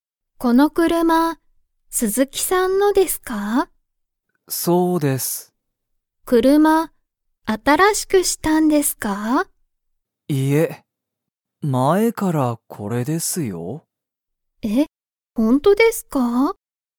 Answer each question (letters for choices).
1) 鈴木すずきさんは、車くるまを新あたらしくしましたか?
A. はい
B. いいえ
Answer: B

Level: Level 1